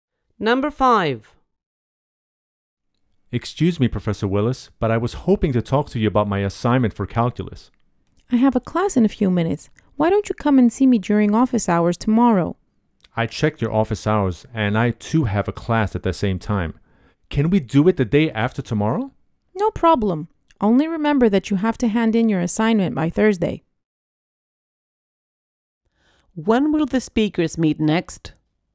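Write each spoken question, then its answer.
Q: When will the speakers meet next?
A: The day after tomorrow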